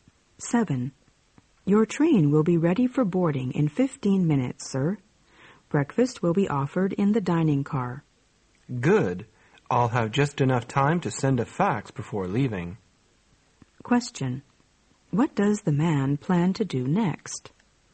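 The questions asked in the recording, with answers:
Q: What does the man plan to do next?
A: Send a fax.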